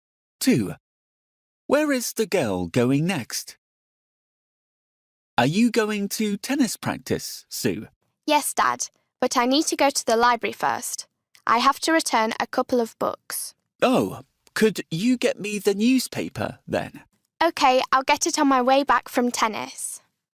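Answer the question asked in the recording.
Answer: to the library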